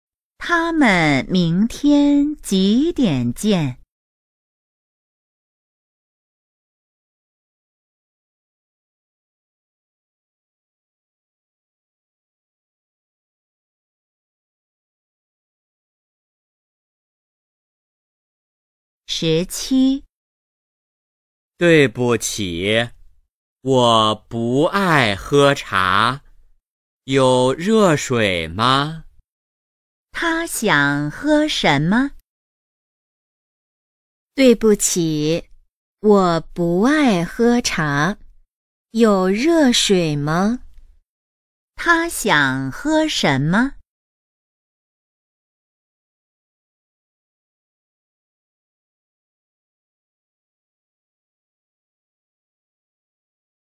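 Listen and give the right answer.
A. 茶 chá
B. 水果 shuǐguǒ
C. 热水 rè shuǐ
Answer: C. 热水 rè shuǐ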